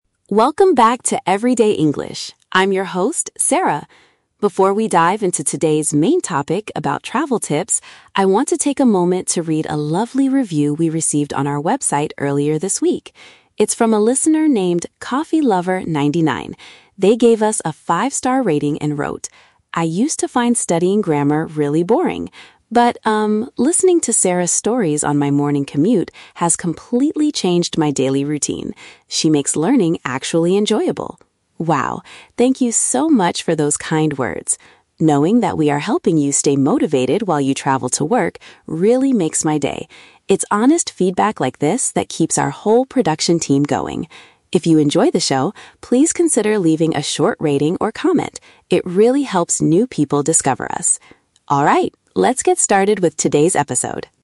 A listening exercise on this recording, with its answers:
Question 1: What is the main purpose of this introduction?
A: To share and appreciate a listener's message.

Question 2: When does the listener ('CoffeeLover99') usually listen to the podcast?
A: During their journey to work.

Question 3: What does the host ask the audience to do at the end of her introduction?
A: Write an evaluation to help the show grow.

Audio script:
Sarah: Welcome back to Everyday English! I'm your host, Sarah. Before we dive into today's main topic about travel tips, I want to take a moment to read a lovely review we received on our website earlier this week. It's from a listener named 'CoffeeLover99'. They gave us a five-star rating and wrote: "I used to find studying grammar really boring. But, um, listening to Sarah's stories on my morning commute has completely changed my daily routine. She makes learning actually enjoyable!" Wow. Thank you so much for those kind words! Knowing that we are helping you stay motivated while you travel to work really makes my day. It's honest feedback like this that keeps our whole production team going. If you enjoy the show, please consider leaving a short rating or comment—it really helps new people discover us. Alright, let's get started with today's episode!